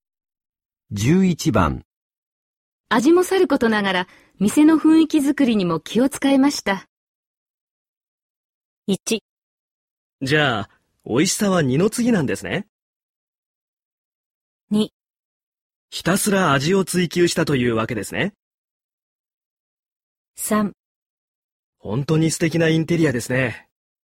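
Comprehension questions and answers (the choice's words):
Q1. 味もさることながら、店の雰囲気作りにも気を遣いました。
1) じゃ、美味しさは二の次ですね。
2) ひたすら味を追求したというわけですね。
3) 本当に素敵なインテリアですね。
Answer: 本当に素敵なインテリアですね。

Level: N1级别听力题库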